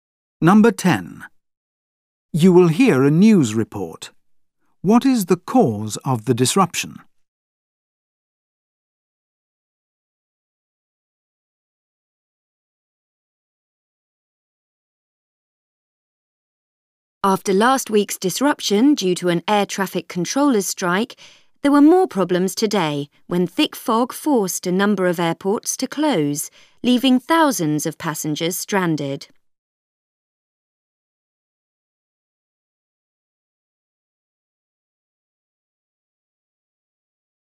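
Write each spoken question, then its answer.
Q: What is the cause of the disruption?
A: Thick fog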